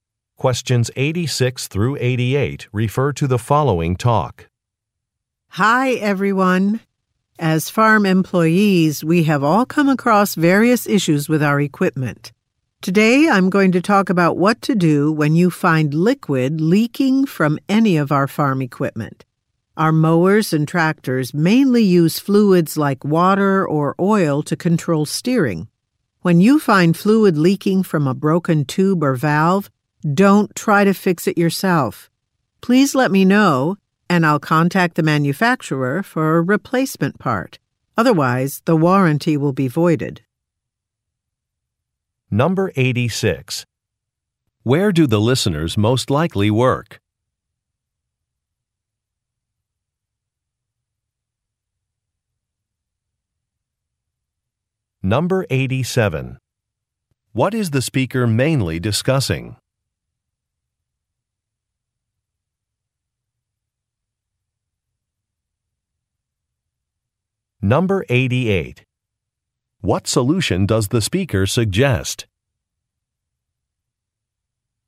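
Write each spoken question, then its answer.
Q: Where do the listeners most likely work?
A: On a farm

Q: What is the speaker mainly discussing?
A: What to do about fluid leaking from equipment

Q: What solution does the speaker suggest?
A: Report it so a replacement part is ordered from the manufacturer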